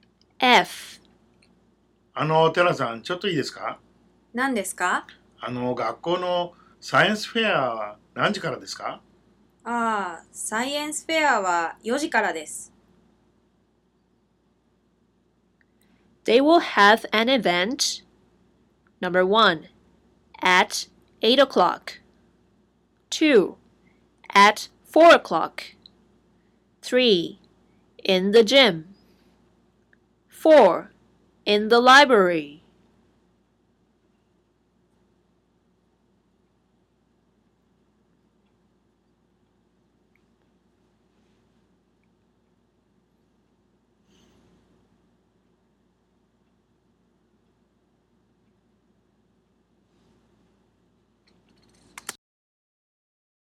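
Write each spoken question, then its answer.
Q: They will have an event Number 1 At 8 o'clock 2 At 4 o'clock 3 In the gym 4 in the library.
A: 2: At 4 o'clock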